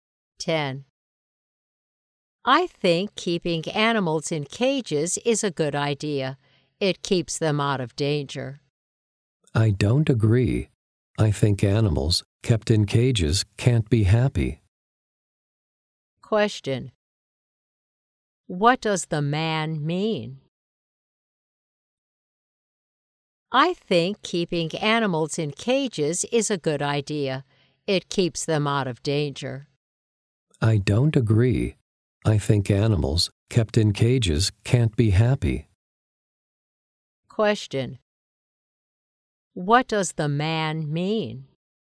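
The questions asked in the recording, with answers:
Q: What does the man mean?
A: Animals kept in cages can't be happy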